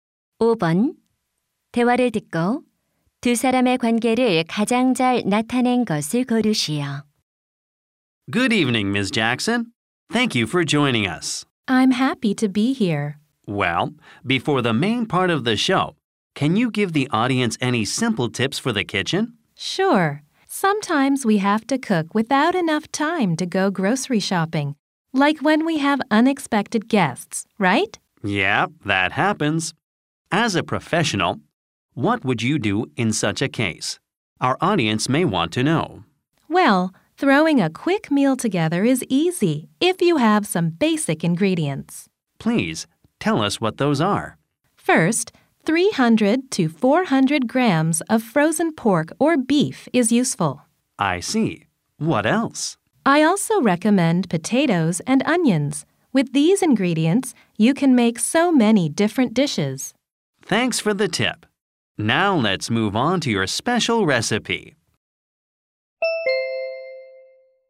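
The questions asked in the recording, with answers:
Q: 대화를 듣고 두 사람의 관계를 가장 잘 나타낸 것을 고르시오.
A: 방송 진행자 - 요리 전문가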